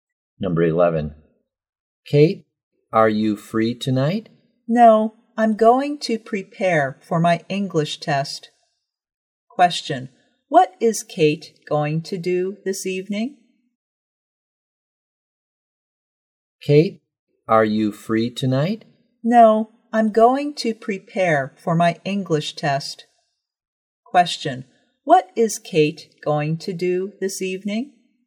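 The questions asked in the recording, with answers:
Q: Question, what is Kate going to do this evening?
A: Prepare for her English test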